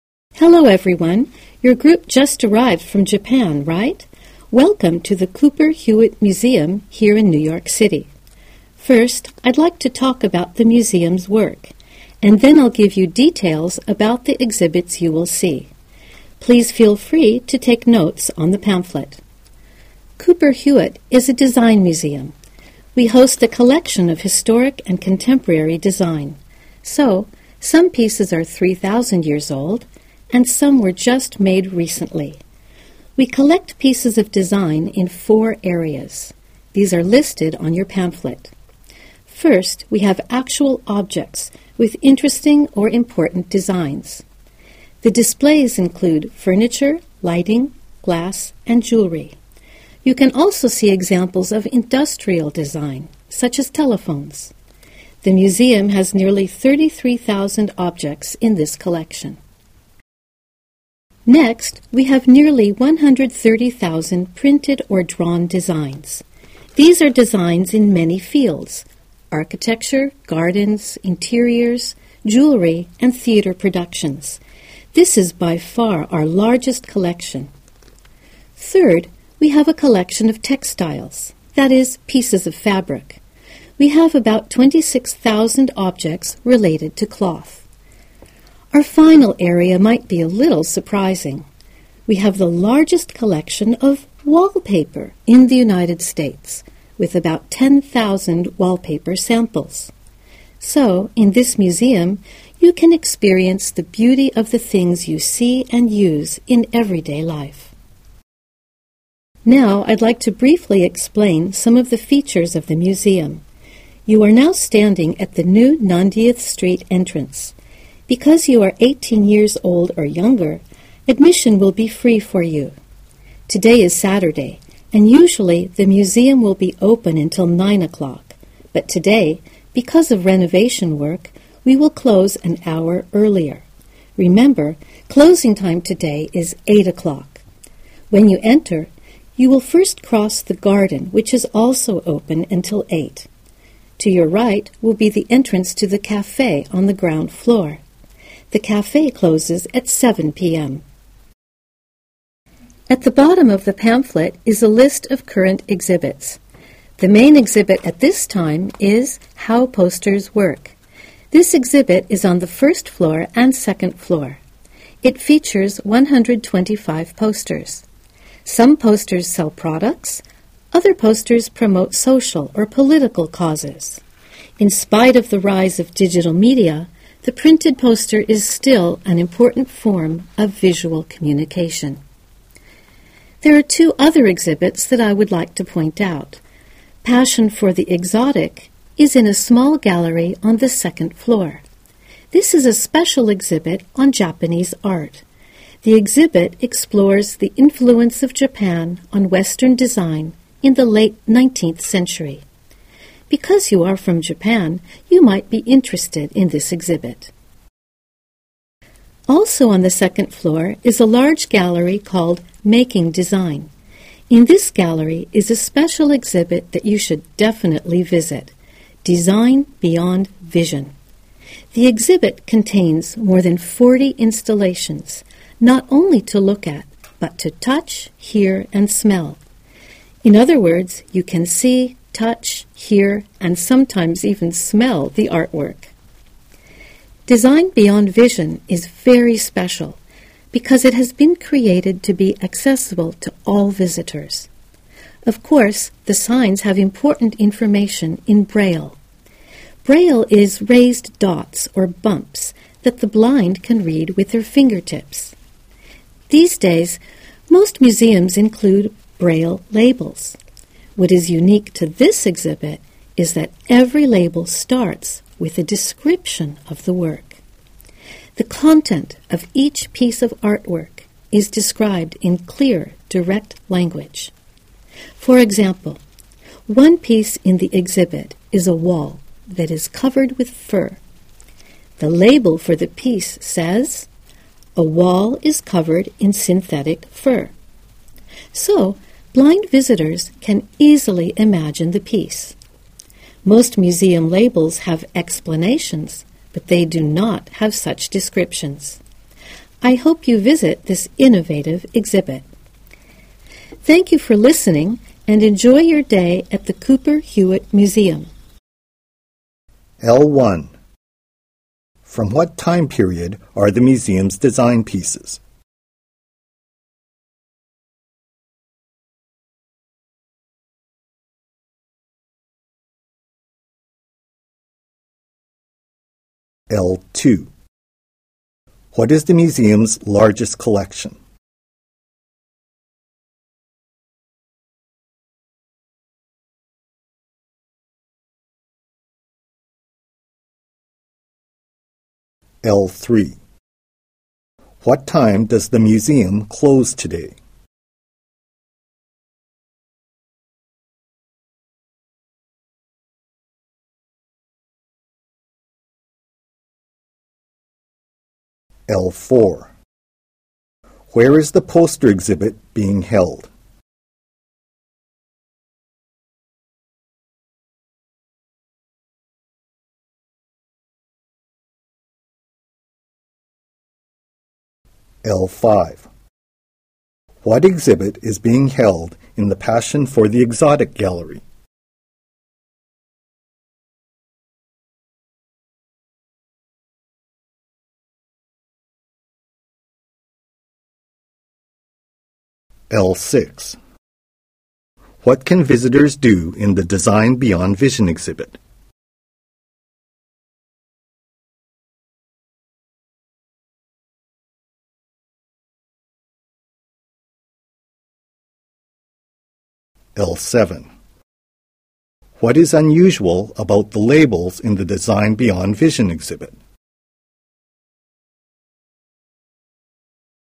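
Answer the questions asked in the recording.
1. From about 3,000 years ago to recent times (historic and contemporary)
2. Printed or drawn designs (nearly 130,000)
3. 8 o'clock
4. On the first and second floors
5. A special exhibit on Japanese art and its influence on Western design
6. See, touch, hear, and sometimes smell the artwork
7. Every label starts with a description of the work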